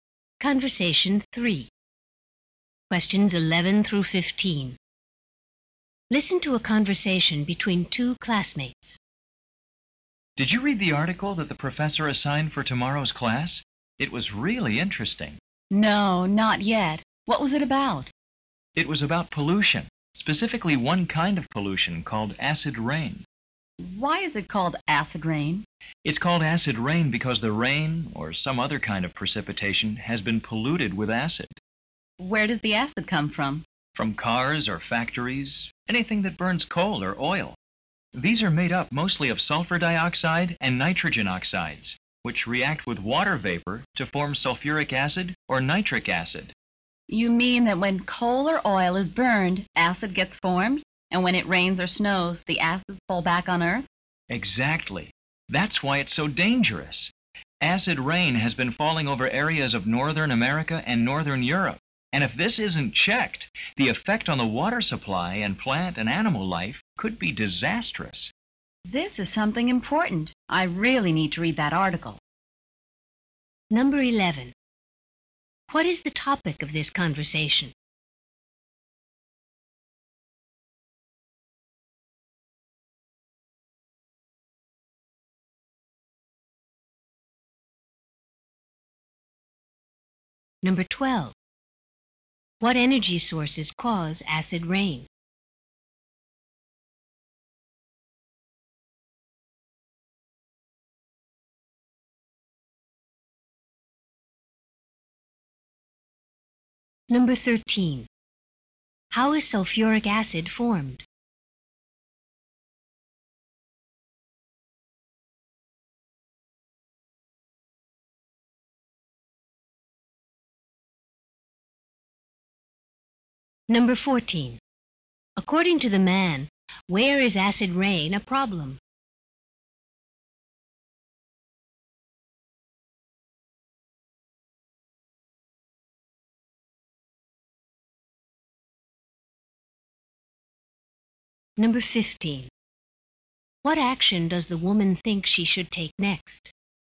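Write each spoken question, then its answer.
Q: What is the topic of this conversation?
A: Acid rain

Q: What energy sources cause acid rain?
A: Coal and oil

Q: How is sulfuric acid formed?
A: Sulfur dioxide reacts with water vapor

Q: According to the man, where is acid rain a problem?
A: In northern North America and northern Europe

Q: What action does the woman think she should take next?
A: Read the article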